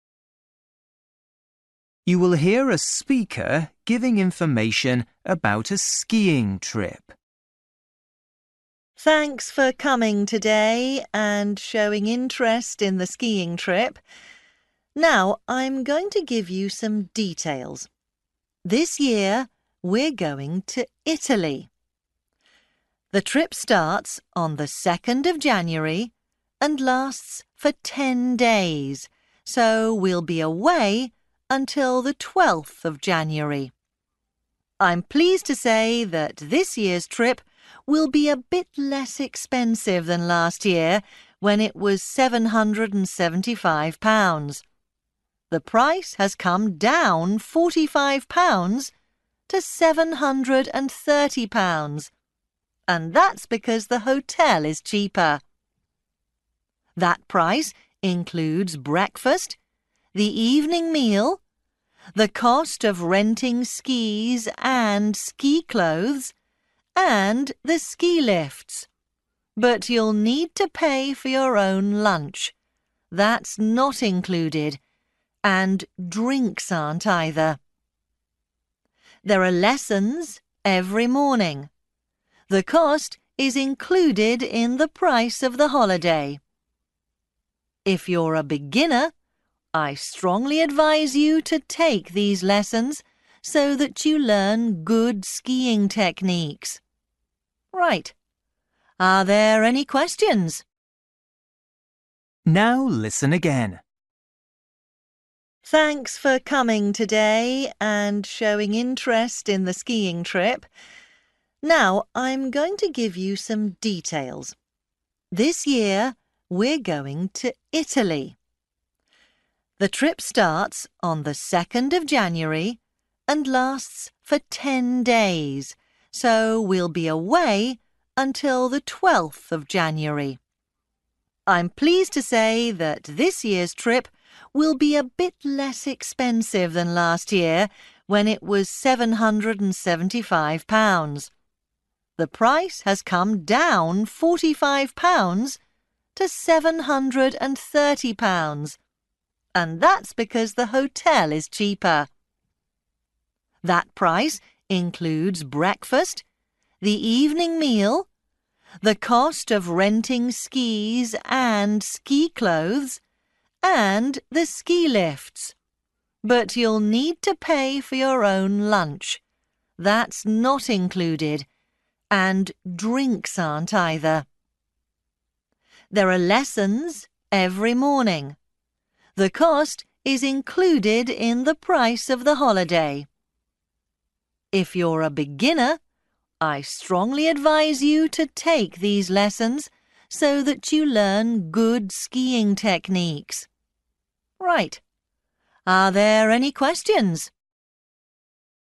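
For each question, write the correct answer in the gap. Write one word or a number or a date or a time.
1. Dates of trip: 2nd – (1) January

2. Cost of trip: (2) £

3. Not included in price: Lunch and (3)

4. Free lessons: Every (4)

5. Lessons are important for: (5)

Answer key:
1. 12th
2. 730
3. drinks
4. morning
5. beginners

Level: Luyện nghe trình độ A2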